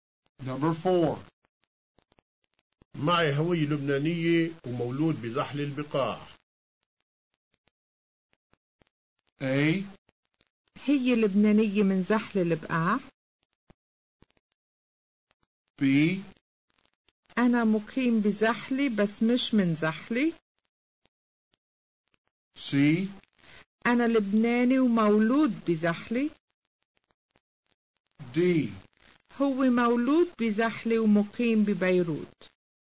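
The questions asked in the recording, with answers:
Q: معي هوية لبنانية ومولود بزحل البقاع.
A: C: أنا لبناني ومولود بزحلي.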